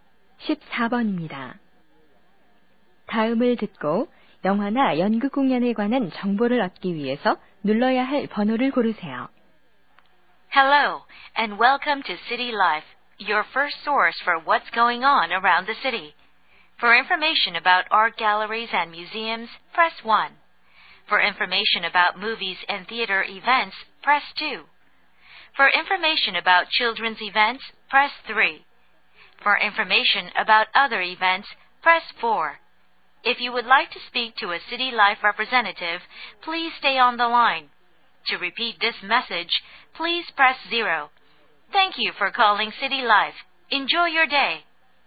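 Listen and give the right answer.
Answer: 2번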